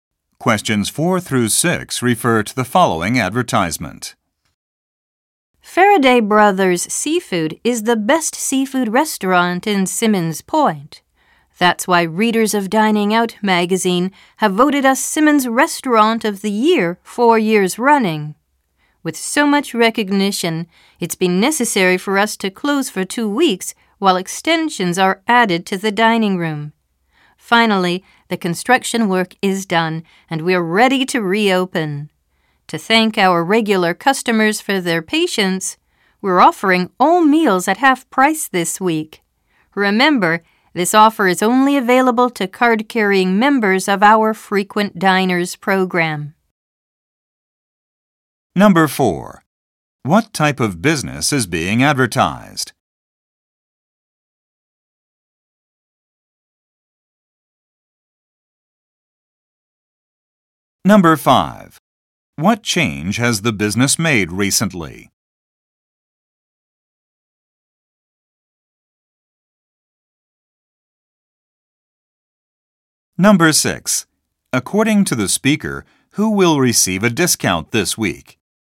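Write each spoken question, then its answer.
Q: What type of business is being advertised?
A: A seafood restaurant

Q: What change has the business made recently?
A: It extended its dining room

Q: According to the speaker, who will receive a discount this week?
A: Members of the Frequent Diners program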